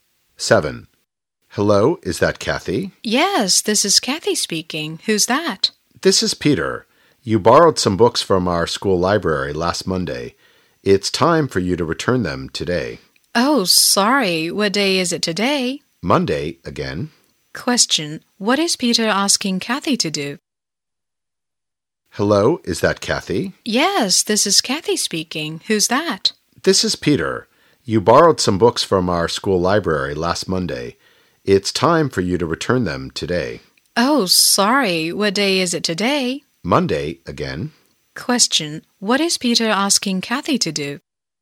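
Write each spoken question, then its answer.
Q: What is Peter asking Kathy to do?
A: To return the books she borrowed from the school library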